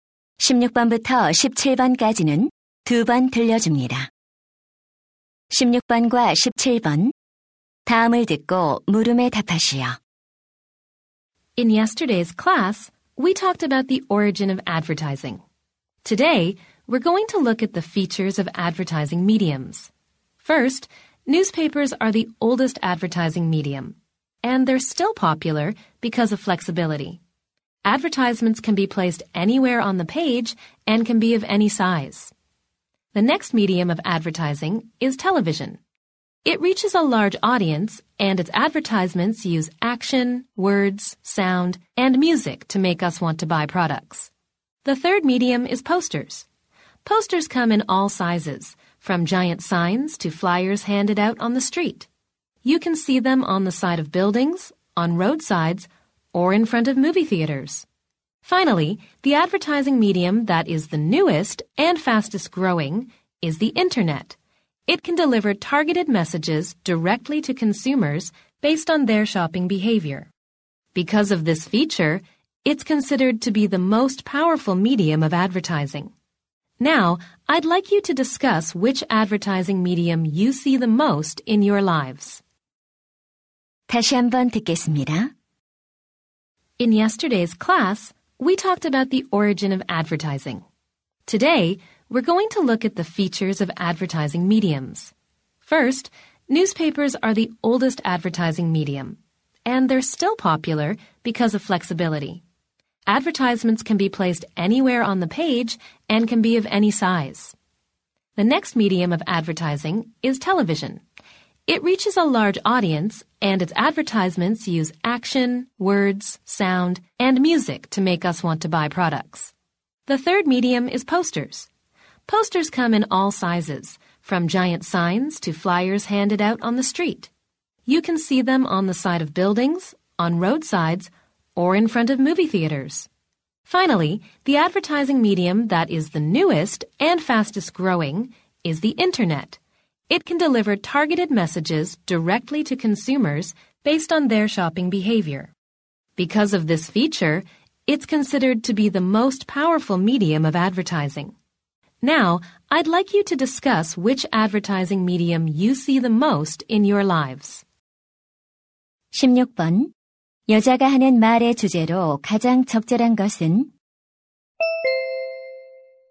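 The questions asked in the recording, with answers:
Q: 여자가 하는 말의 주제로 가장 적절한 것은?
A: 광고 매체들의 특징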